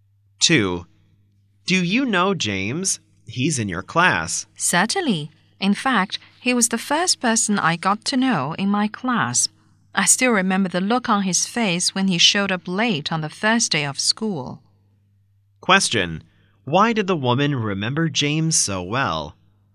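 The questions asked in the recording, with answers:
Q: Why did the woman remember James so well?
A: He was the first person she got to know, and he showed up late on the first day of school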